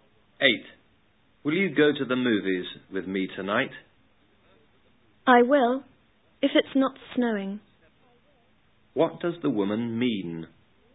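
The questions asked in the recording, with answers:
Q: What does the woman mean?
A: She will go to the movies if it doesn't snow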